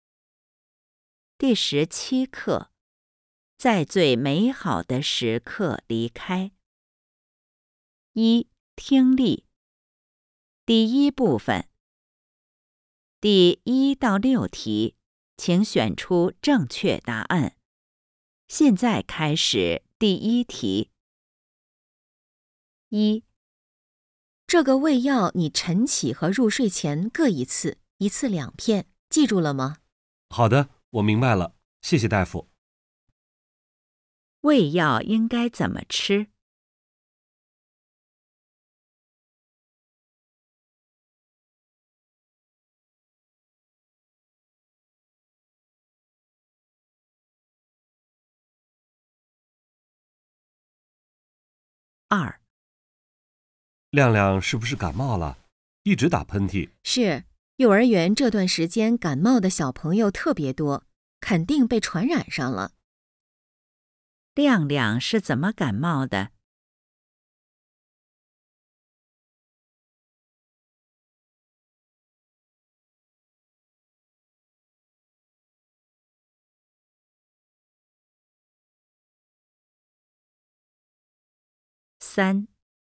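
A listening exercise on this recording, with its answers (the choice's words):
第1-6题:请选择正确答案。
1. 胃药应该怎么吃?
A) 餐前吃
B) 饭后吃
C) 一日三次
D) 早晚各两片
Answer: 早晚各两片

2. 亮亮是怎么感冒的?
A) 穿得太少了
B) 睡觉着凉了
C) 玩儿得太累了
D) 小朋友传染的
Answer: 小朋友传染的

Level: HSK 5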